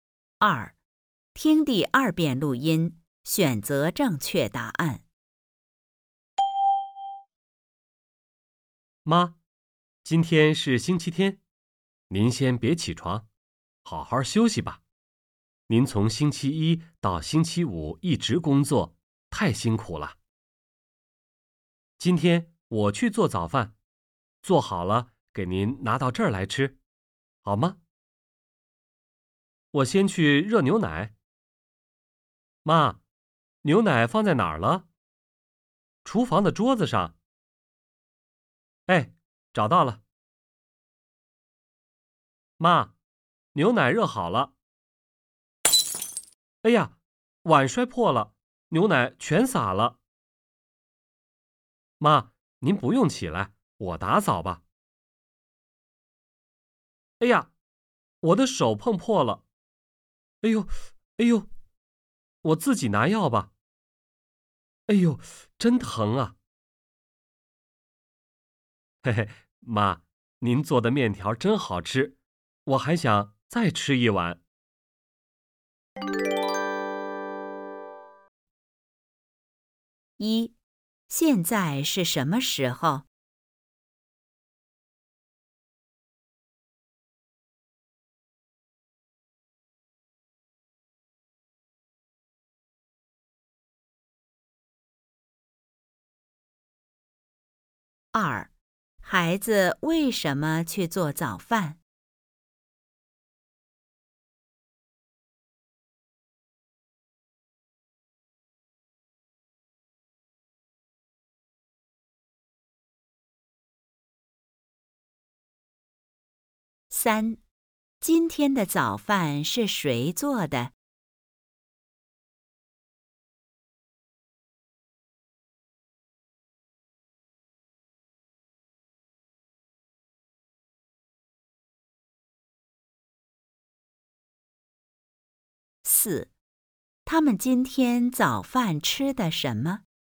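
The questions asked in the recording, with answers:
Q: 现在是什么时候?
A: 星期天早上

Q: 孩子为什么去做早饭?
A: 妈妈从星期一到星期五一直工作,太辛苦了

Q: 今天的早饭是谁做的?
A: 妈妈

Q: 他们今天早饭吃的什么?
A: 面条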